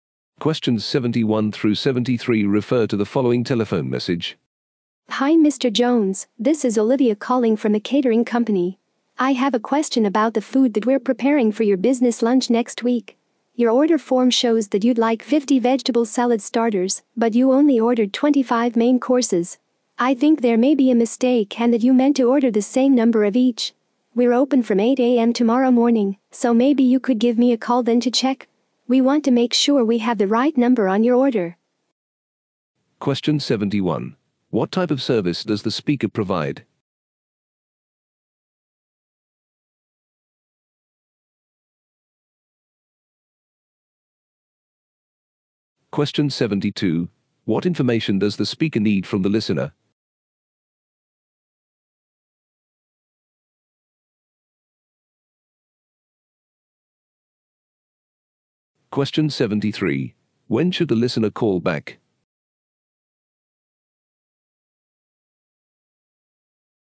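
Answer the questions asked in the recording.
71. Catering
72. The correct number of dishes in the order
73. Tomorrow morning from 8 a.m.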